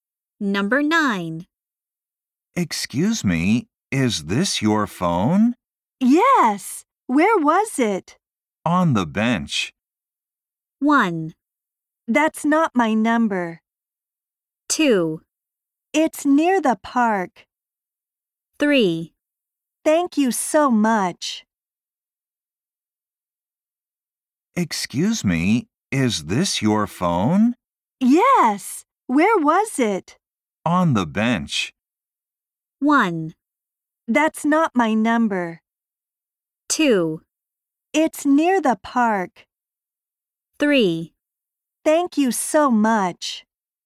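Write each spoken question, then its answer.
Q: On the bench.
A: 3: Thank you so much.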